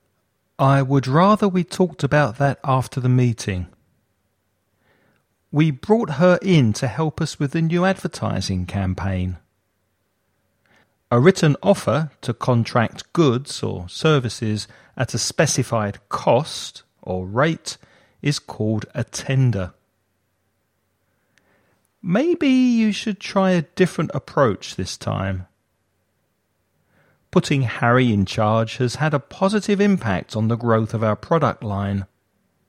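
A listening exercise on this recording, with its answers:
Choose the best words for each sentence.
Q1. I talked about that after the meeting.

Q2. We to help us with the new advertising campaign.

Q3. A written offer to contract goods or services at a specified cost or rate is called .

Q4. Maybe you should try a different this time.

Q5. Putting Harry in charge has had a on the growth of our product line.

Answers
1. would rather we
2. brought her in
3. a tender
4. approach
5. positive impact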